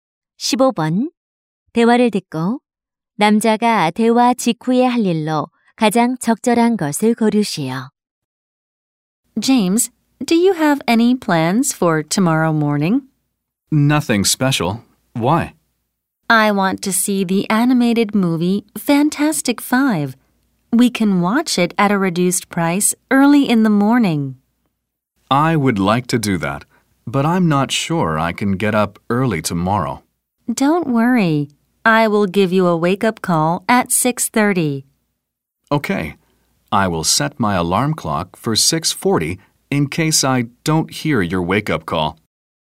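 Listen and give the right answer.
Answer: 알람 시계를 6시 40분에 맞추기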